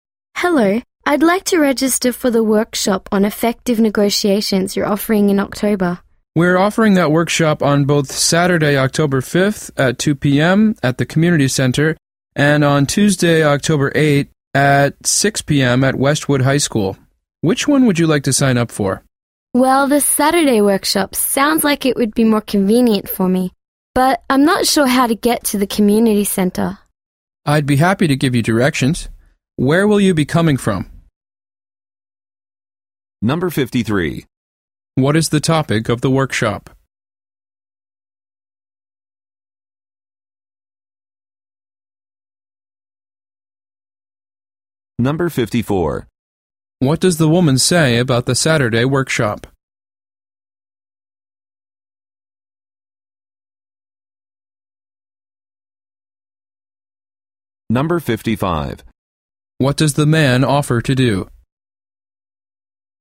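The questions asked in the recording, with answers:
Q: What is the topic of the workshop?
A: Effective negotiations

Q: What does the woman say about the Saturday workshop?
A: It would be more convenient for her

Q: What does the man offer to do?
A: Give her directions to the Community Center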